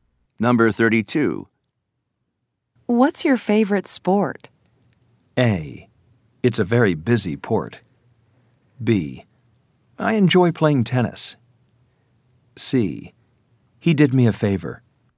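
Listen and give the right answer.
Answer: B: I enjoy playing tennis.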